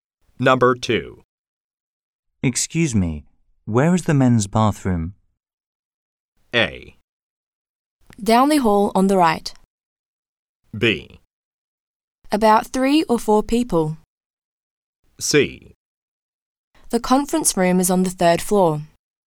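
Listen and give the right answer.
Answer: A: Down the hall on the right.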